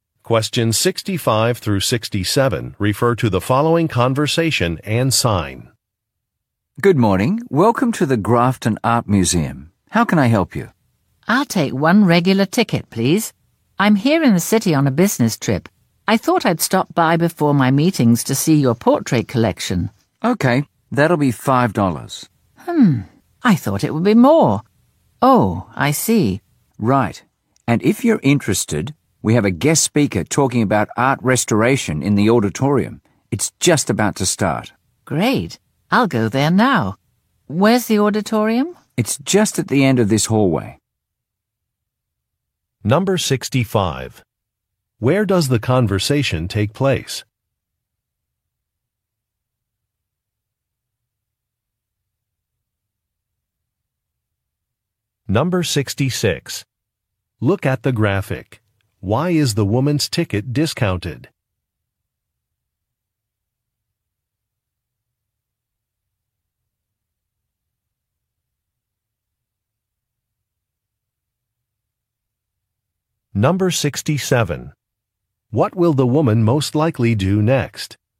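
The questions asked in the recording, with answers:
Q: Where does the conversation take place?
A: At an art museum

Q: What will the woman most likely do next?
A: Go to a talk on art restoration in the auditorium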